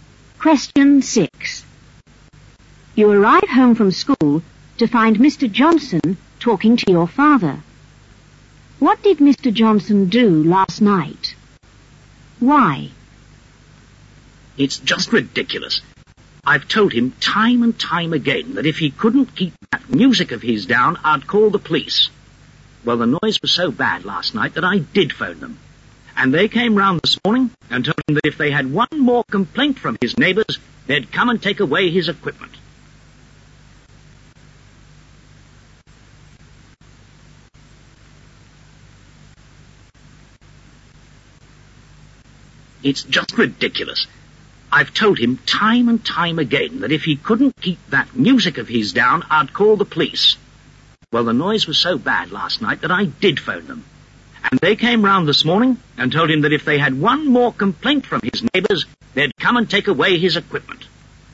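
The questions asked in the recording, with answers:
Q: What did Mr. Johnson do last night?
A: He phoned the police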